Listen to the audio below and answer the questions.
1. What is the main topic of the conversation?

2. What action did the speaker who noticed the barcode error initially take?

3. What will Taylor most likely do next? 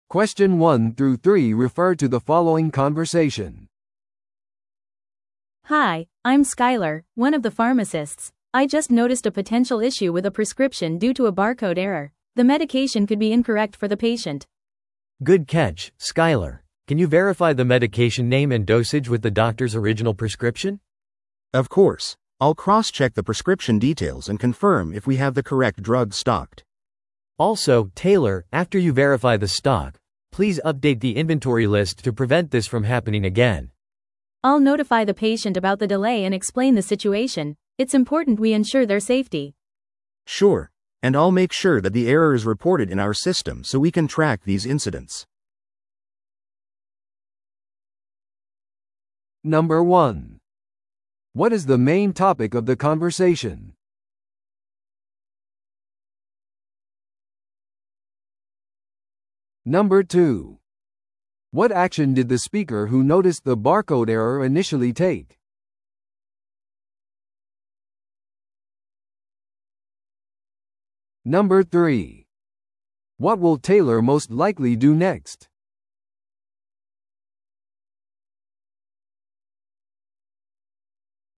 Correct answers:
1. Preventing a medication mix-up.
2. They identified a potential issue with a prescription.
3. Update the inventory list.

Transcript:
I just noticed a potential issue with a prescription due to a barcode error. The medication could be incorrect for the patient.
B: Good catch, Skyler. Can you verify the medication name and dosage with the doctor's original prescription?
C: Of course. I'll cross-check the prescription details and confirm if we have the correct drug stocked.
B: Also, Taylor, after you verify the stock, please update the inventory list to prevent this from happening again.
A: I'll notify the patient about the delay and explain the situation. It's important we ensure their safety.
C: Sure, and I'll make sure that the error is reported in our system so we can track these incidents.